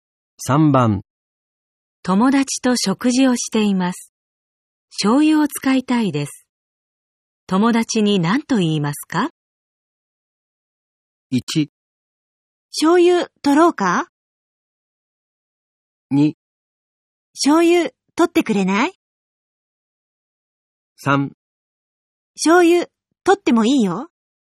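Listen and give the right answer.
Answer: 2: 醤油取ってくれない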